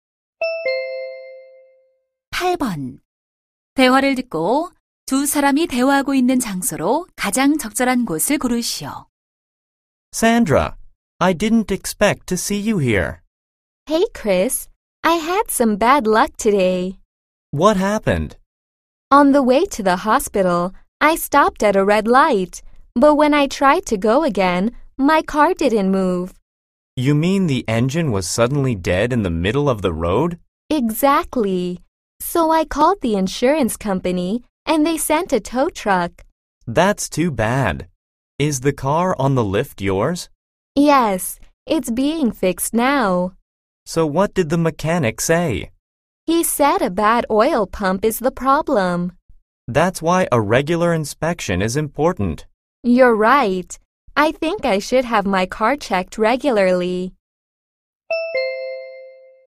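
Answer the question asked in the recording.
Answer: 자동차 정비소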